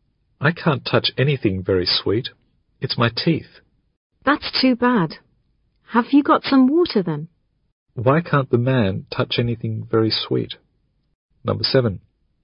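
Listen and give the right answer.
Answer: Because of his teeth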